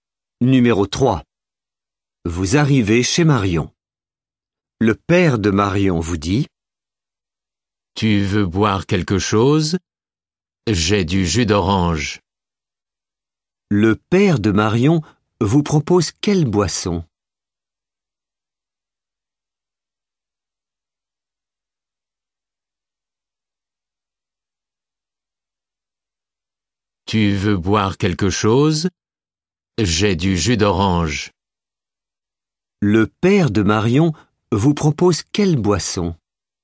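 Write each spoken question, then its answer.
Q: Le père de Marion vous propose quelle boisson ?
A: Du jus d'orange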